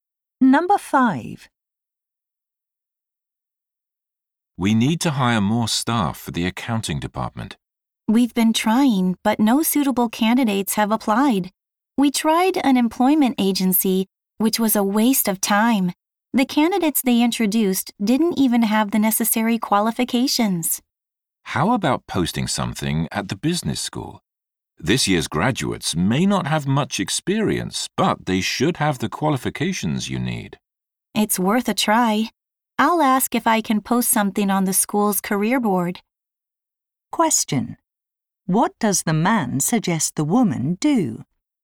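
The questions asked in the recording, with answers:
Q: What does the man suggest the woman do?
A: Post a job notice at the business school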